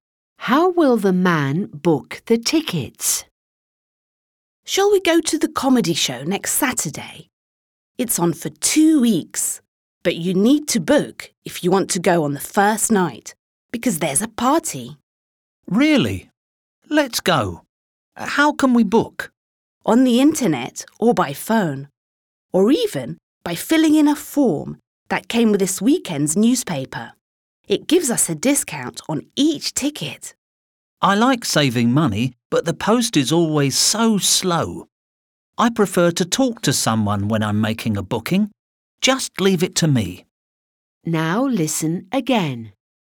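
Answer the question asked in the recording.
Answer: By phone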